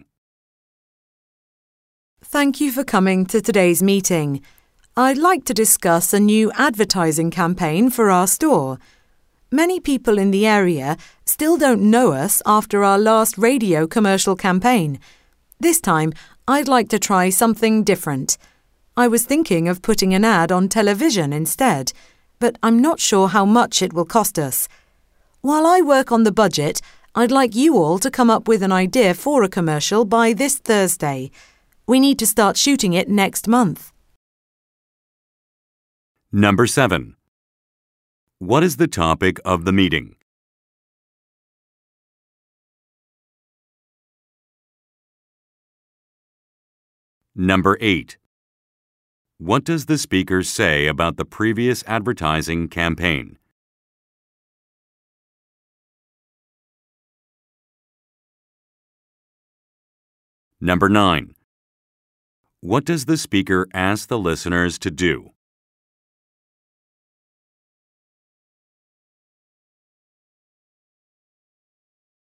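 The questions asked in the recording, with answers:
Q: What is the topic of the meeting?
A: A new advertising campaign for the store

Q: What does the speaker say about the previous advertising campaign?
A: It was a radio commercial campaign, and many people in the area still don't know the store

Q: What does the speaker ask the listeners to do?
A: Come up with an idea for a commercial by Thursday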